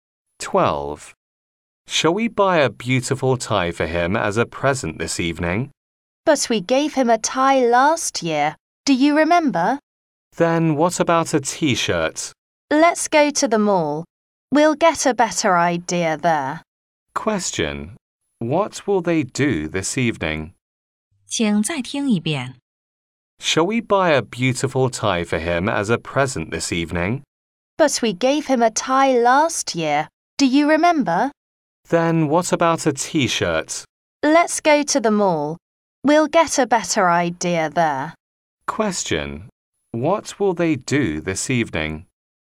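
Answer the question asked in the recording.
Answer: Go to the mall to buy him a present.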